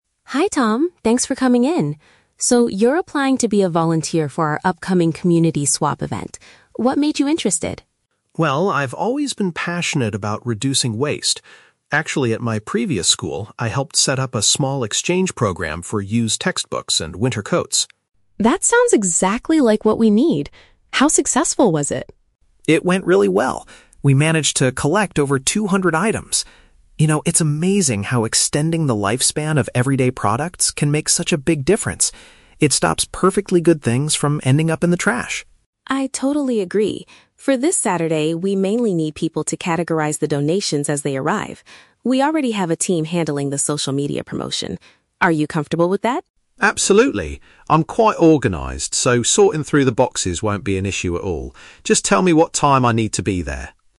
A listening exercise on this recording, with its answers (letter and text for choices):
Listen to the interview between an environmental club leader and a volunteer applicant, then choose the correct answer (A, B, or C) for each question.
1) What did Tom do at his previous school?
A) He collected money to buy new books for the library.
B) He organized a system to trade second-hand educational materials and clothing.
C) He worked for a local company that recycles old textiles.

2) According to Tom, what is the main benefit of swapping items?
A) It prevents usable goods from being thrown away.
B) It encourages people to buy cheaper, eco-friendly products.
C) It helps the local government save money on waste management.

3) What will Tom's specific duty be this Saturday?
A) Advertising the event on the internet.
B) Driving around the city to pick up donations.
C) Grouping the received items into different types.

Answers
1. B) He organized a system to trade second-hand educational materials and clothing.
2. A) It prevents usable goods from being thrown away.
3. C) Grouping the received items into different types.

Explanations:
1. Tom says he set up an "exchange program for used textbooks and winter coats." Option (B) uses paraphrases ("trade" for "exchange", "second-hand educational materials" for "used textbooks", "clothing" for "winter coats"). Option (A) is a trap; he dealt with books, but didn't buy new ones. Option (C) is plausible but he did this at a "school", not for a "company".
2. Tom says it "stops perfectly good things from ending up in the trash." Option (A) paraphrases this idea ("prevents" = "stops", "usable goods" = "perfectly good things", "being thrown away" = "ending up in the trash"). Option (B) is a trap; the goal of the event is to exchange used items, not to "buy" new products. Option (C) is a plausible real-world benefit but is never mentioned in the audio.
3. Sarah says they need people to "categorize the donations," and Tom agrees that "sorting through the boxes" won't be an issue. Option (C) is a paraphrase of categorizing/sorting. Option (A) is a trap; "social media promotion" is mentioned, but Sarah says "We already have a team handling" it, so Tom won't do it. Option (B) is not mentioned.

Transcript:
Sarah: Hi Tom, thanks for coming in. So, you're applying to be a volunteer for our upcoming Community Swap Event. What made you interested?
Tom: Well, I've always been passionate about reducing waste. Actually, at my previous school, I helped set up a small exchange program for used textbooks and winter coats.
Sarah: That sounds exactly like what we need! How successful was it?
Tom: It went really well. We managed to collect over two hundred items. You know, it's amazing how extending the lifespan of everyday products can make such a big difference. It stops perfectly good things from ending up in the trash.
Sarah: I totally agree. For this Saturday, we mainly need people to categorize the donations as they arrive. We already have a team handling the social media promotion. Are you comfortable with that?
Tom: Absolutely. I'm quite organized, so sorting through the boxes won't be an issue at all. Just tell me what time I need to be there.